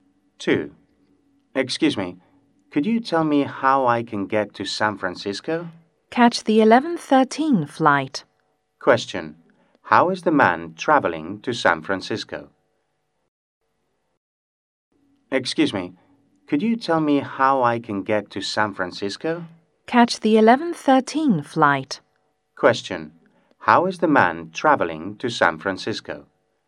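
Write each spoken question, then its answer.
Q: How is the man traveling to San Francisco?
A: By plane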